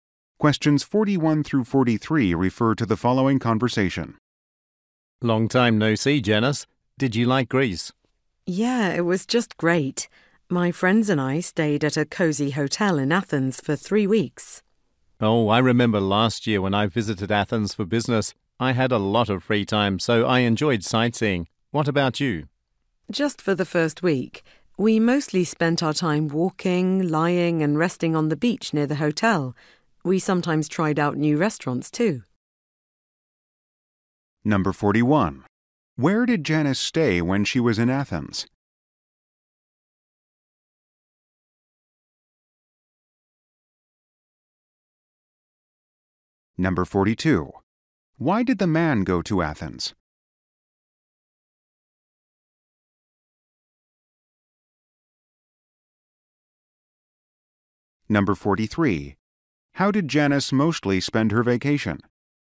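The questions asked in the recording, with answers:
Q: Where did Janice stay when she was in Athens?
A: At a cozy hotel

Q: Why did the man go to Athens?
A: For business

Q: How did Janice mostly spend her vacation?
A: Walking and resting on the beach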